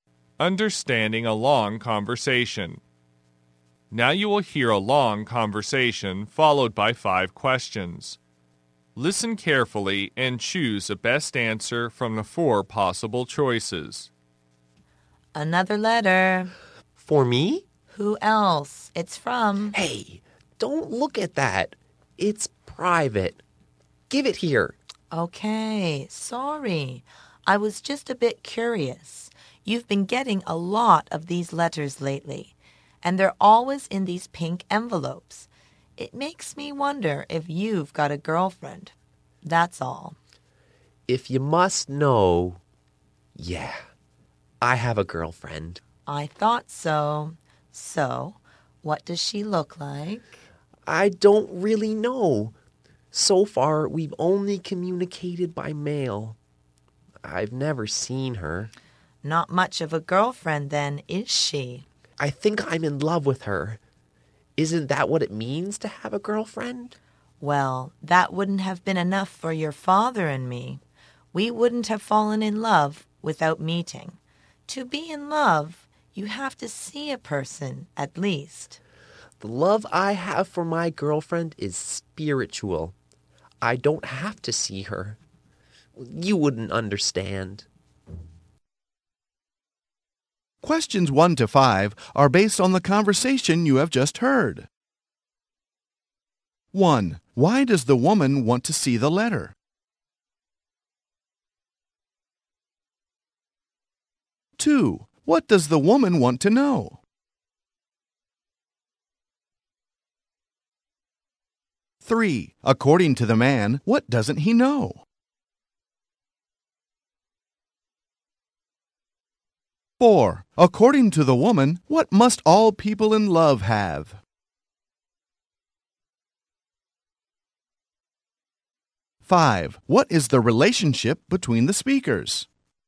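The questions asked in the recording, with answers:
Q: Why does the woman want to see the letter?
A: She is curious

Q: What does the woman want to know?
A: Whether he has a girlfriend

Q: According to the man, what doesn't he know?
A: What his girlfriend looks like

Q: According to the woman, what must all people in love have?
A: They must have seen each other

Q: What is the relationship between the speakers?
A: Mother and son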